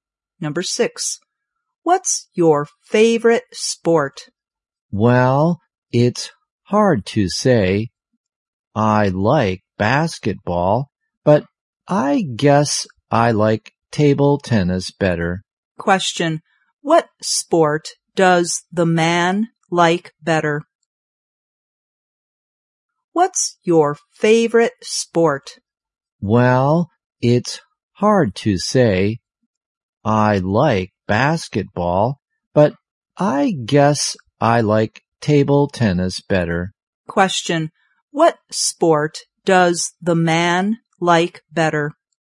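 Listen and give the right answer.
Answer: Table tennis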